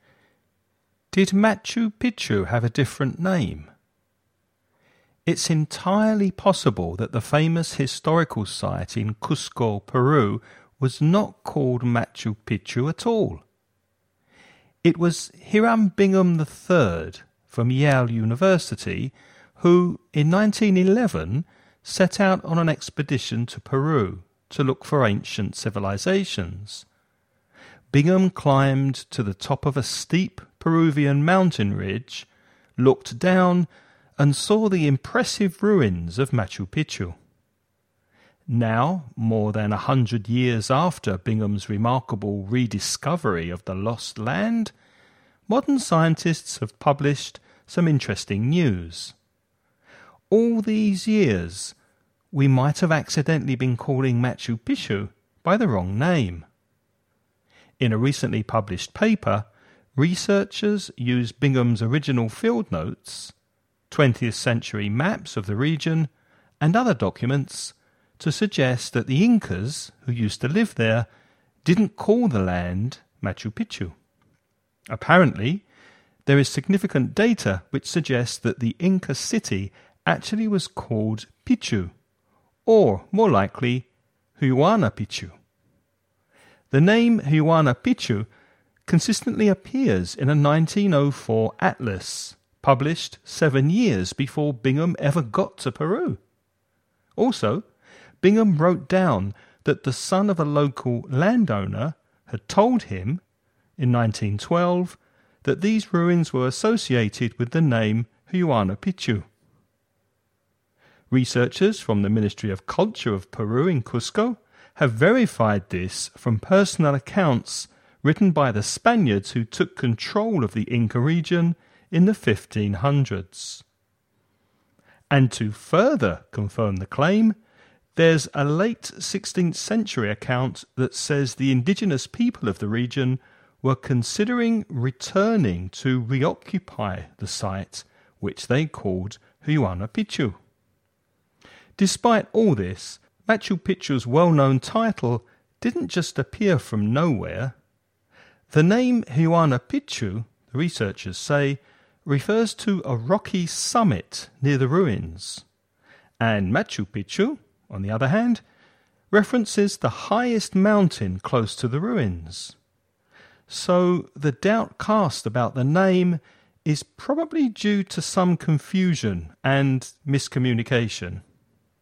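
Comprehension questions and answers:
Listen and write the questions you hear.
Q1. Which phrasal verb means to start or begin (for example, to begin an expedition)?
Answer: set out

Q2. How long ago did Bingham rediscover the ancient site?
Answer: More than 100 years ago (in 1911)

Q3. Which ancient civilization used to live in this area?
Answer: The Incas

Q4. When did the Spaniards take control of the Inca region?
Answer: In the 1500s

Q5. According to the researchers, what does Machu Picchu actually refer to?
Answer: The highest mountain close to the ruins

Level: nivel intermedio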